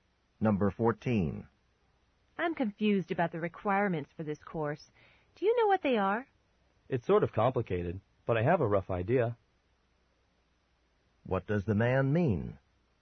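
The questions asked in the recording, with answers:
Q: What does the man mean?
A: He has a general idea of the requirements.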